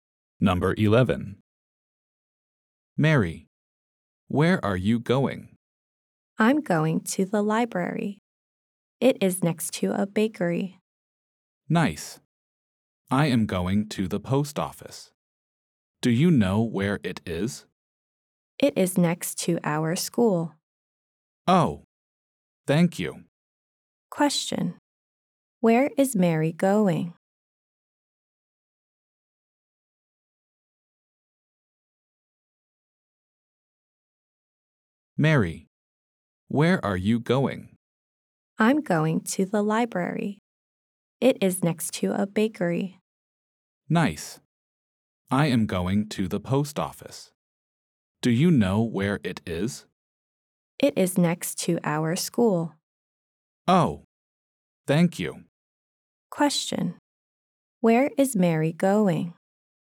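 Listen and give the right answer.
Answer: To the library.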